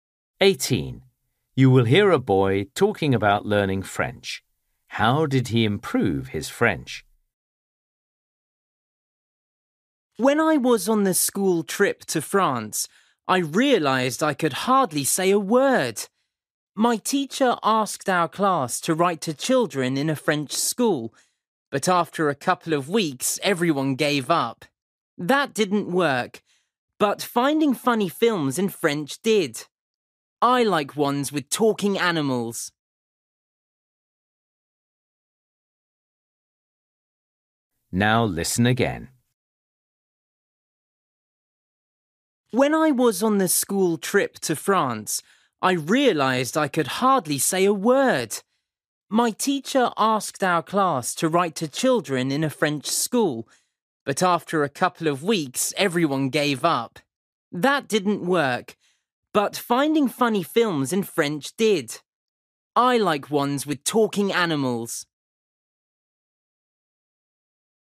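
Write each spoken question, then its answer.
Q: How did he improve his French?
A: By watching funny French films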